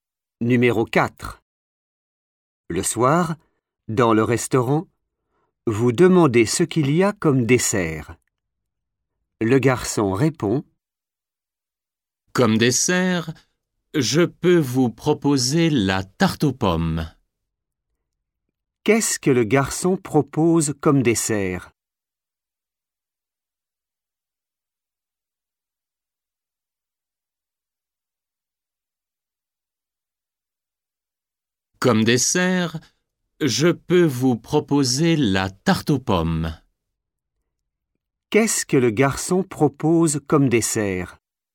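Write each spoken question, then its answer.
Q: Qu'est-ce que le garçon propose comme dessert?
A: la tarte aux pommes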